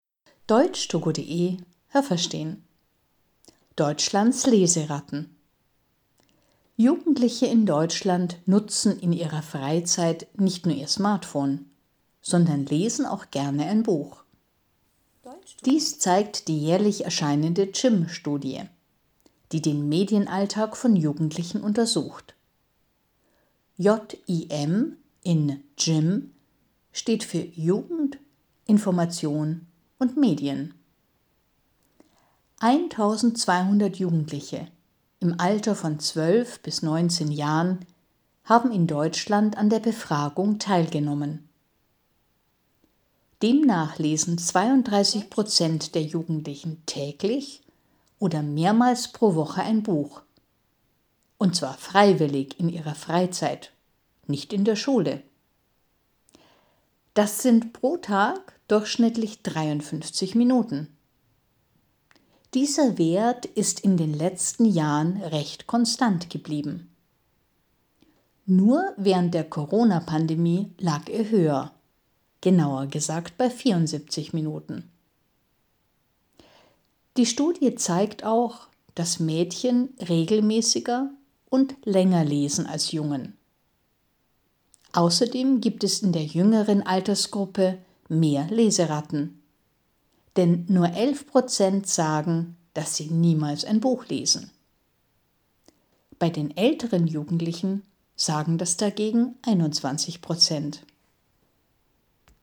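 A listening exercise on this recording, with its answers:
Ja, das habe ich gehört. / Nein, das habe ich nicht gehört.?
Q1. Jugendliche in Deutschland lesen nicht gerne Bücher, weil sie nur ihr Smartphone benutzen.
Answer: Nein, das habe ich nicht gehört.

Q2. Die JIM-Studie: „JIM" bedeutet J ugend, I ntelligenz und M edien.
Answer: Nein, das habe ich nicht gehört.

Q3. An der Studie haben 1.200 Jugendliche im Alter von 12 bis 19 Jahren teilgenommen.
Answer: Ja, das habe ich gehört.

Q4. 32 Prozent der Jugendlichen lesen täglich oder mehrmals in der Woche ein Buch in der Schule.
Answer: Nein, das habe ich nicht gehört.

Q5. Jugendliche lesen heute durchschnittlich pro Tag 53 Minuten.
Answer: Ja, das habe ich gehört.

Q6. Jungen lesen nicht so regelmäßig wie Mädchen.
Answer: Ja, das habe ich gehört.

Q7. 12-jährige Jugendliche lesen mehr als 19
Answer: Ja, das habe ich gehört.

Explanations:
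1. Sie nutzen ihr Smartphone, lesen aber auch gerne ein Buch.
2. Es bedeutet J ugend, I nformation und M edien.
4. So viel lesen sie nicht in der Schule, sondern in ihrer Freizeit.

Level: B1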